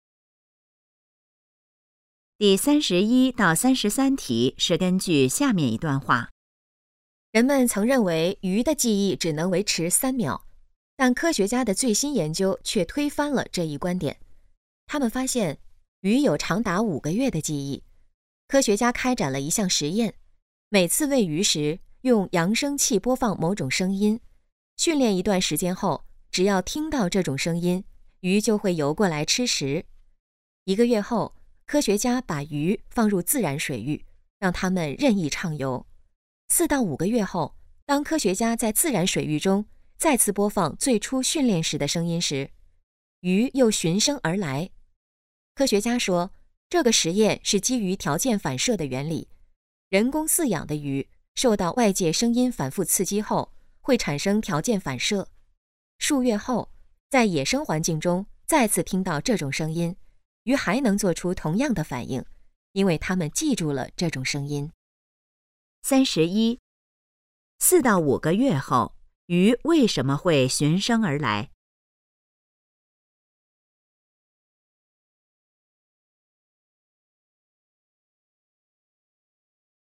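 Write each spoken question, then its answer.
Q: 4到5个月后,鱼为什么会循声而来?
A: 它们记住了这种声音

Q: 这个实验是基于什么原理开展的?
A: 条件反射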